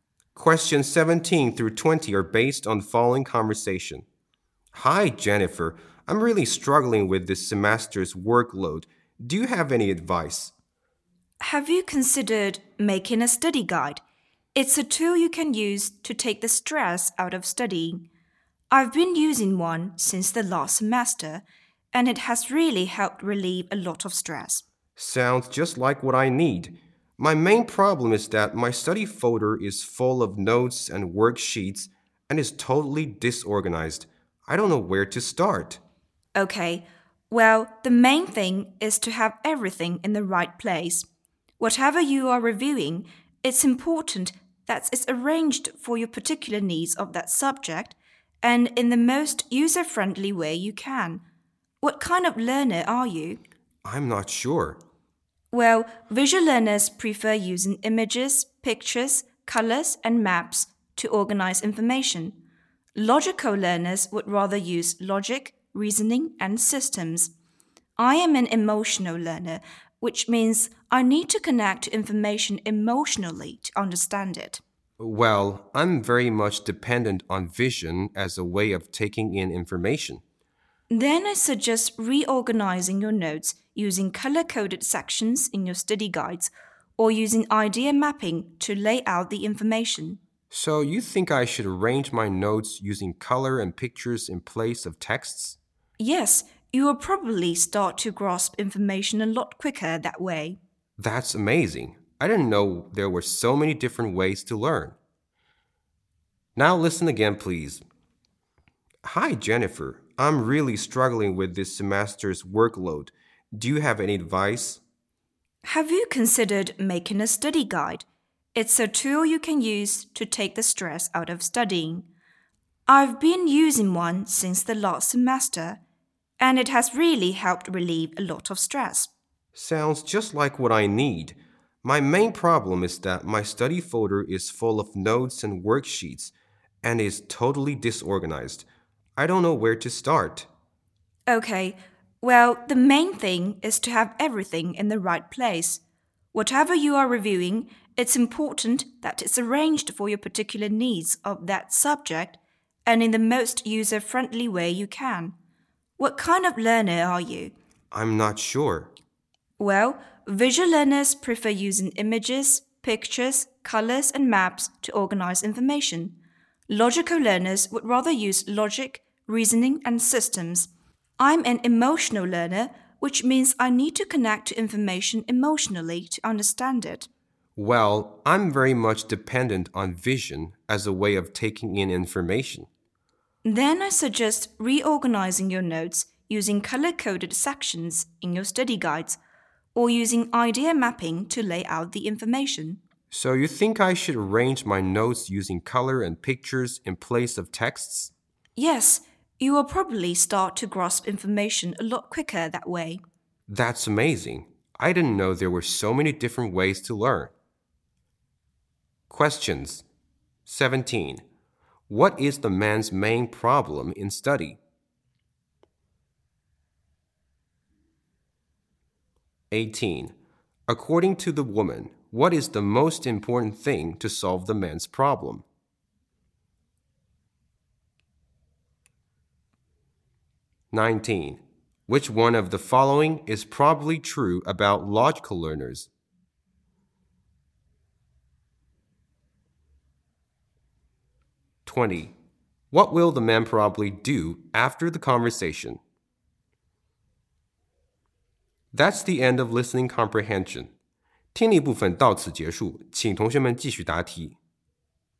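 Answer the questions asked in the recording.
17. His study notes are totally disorganized
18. Having everything in the right place
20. Reorganize his notes using colors and pictures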